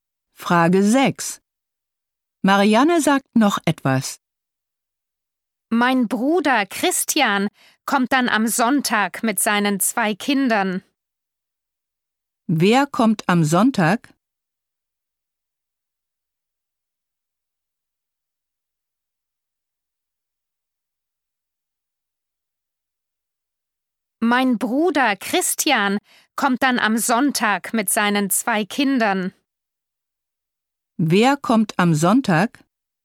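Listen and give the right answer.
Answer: Mariannes Bruder Christian mit seinen 2 Kindern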